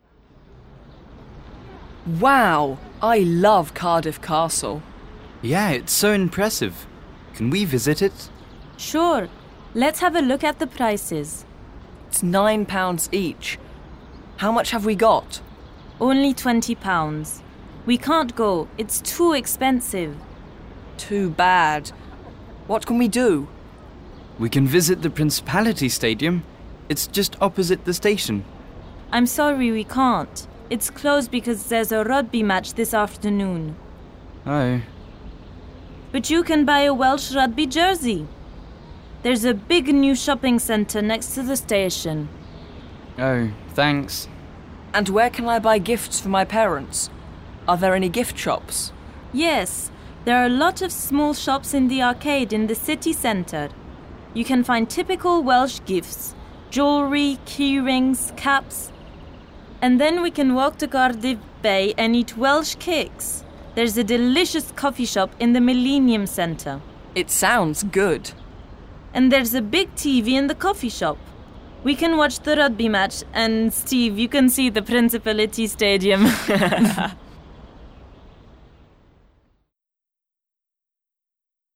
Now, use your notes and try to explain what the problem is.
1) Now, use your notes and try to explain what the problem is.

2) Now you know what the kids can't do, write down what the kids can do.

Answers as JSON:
{"1": "The kids want to visit Cardiff Castle, but it's too expensive.", "2": "They can go shopping in the city centre."}